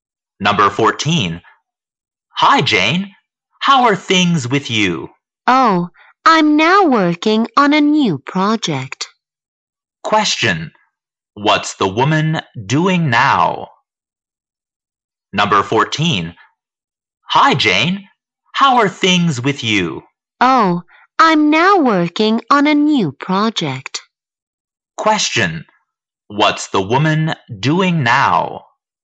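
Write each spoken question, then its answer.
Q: What's the woman doing now?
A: Working on a new project.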